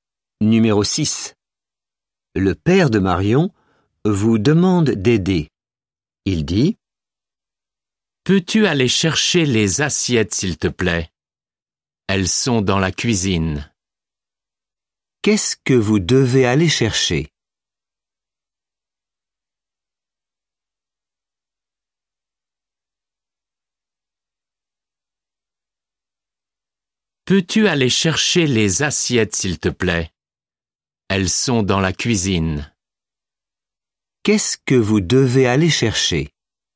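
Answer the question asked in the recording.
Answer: Les assiettes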